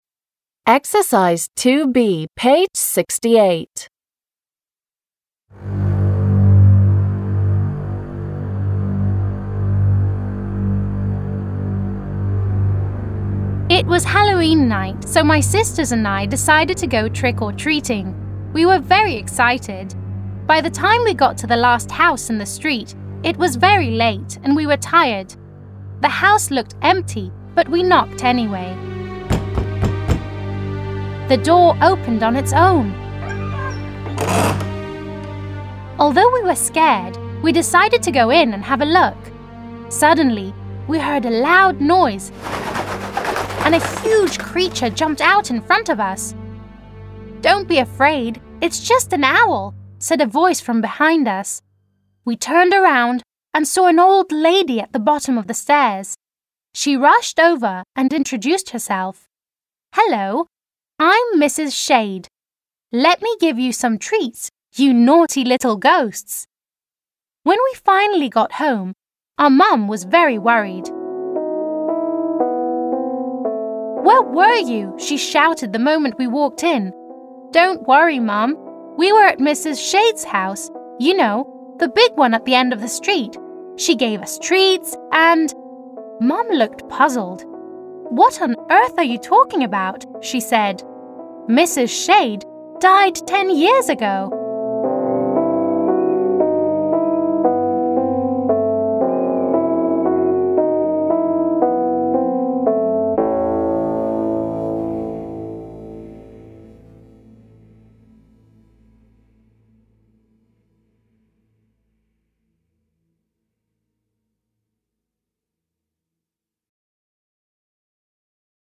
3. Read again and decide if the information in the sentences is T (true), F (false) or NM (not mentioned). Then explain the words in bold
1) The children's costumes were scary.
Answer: NM

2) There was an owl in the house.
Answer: T

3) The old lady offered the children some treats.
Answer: T

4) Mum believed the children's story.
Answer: F

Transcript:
It was Halloween night so my brothers and I decided to go trick-or-treating. We were very excited. By the time we got to the last house in the street, it was very late and we were tired. The house looked empty, but we knocked anyway. The door opened on its own. Although we were scared, we decided to go in and have a look. Suddenly, we heard a loud noise and a huge creature jumped out in front of us. «Don't be afraid, it's just an owl,» said a voice from behind us. We turned around and saw an old lady at the bottom of the stairs. She rushed over and introduced herself. «Hello, I'm Mrs Shade. Let me give you some treats you naughty little ghosts!» When we finally got home, our Mum was very worried. «Where were you?» she shouted, the moment we walked in. «Don't worry mum. We were at Mrs Shade's house, you know the big one at the end of the street. She gave us treats and...» Mum looked puzzled. «What on earth are you talking about?» she said.

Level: 6 класс